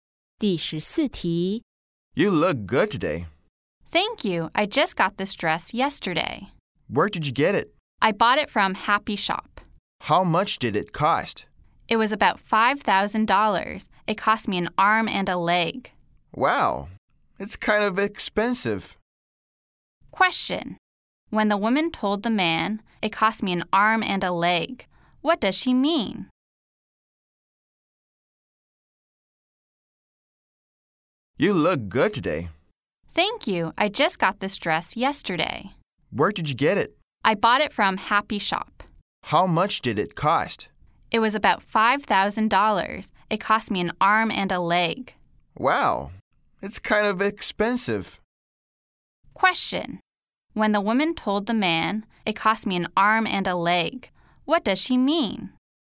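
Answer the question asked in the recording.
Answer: The dress was very expensive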